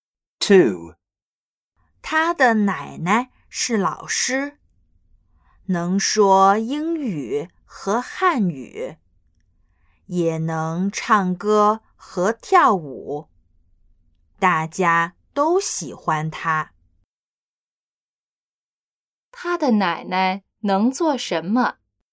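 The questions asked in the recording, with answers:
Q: 他的奶奶能做什么?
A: 说英语和汉语,唱歌和跳舞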